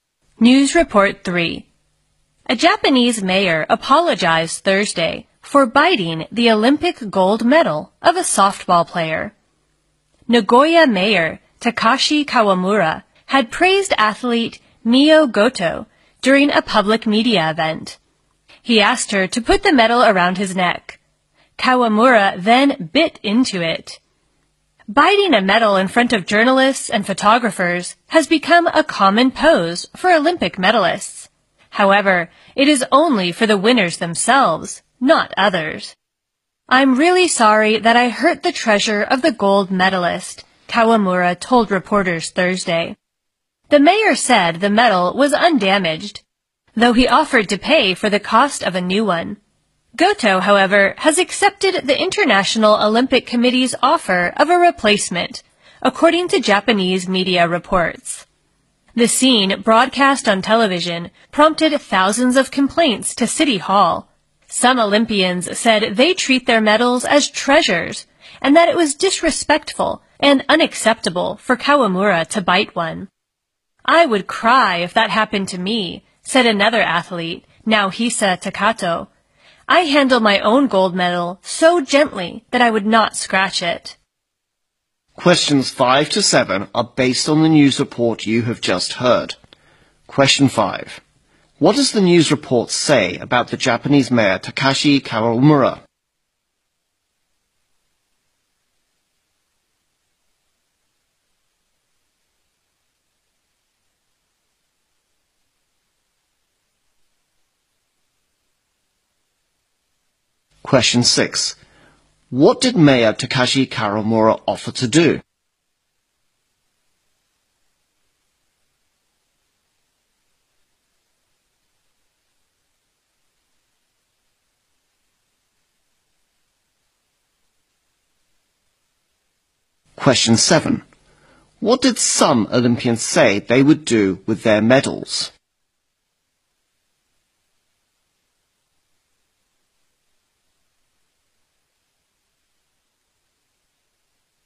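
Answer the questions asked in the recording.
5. He apologized for biting an athlete's Olympic gold medal.
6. Pay for the cost of a new medal.
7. Treat them as treasures.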